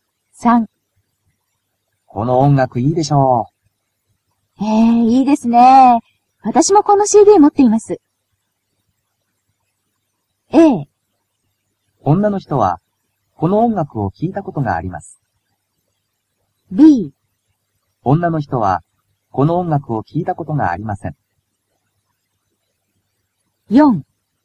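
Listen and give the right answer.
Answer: A: 女の人はこの音楽を聴いたことがあります。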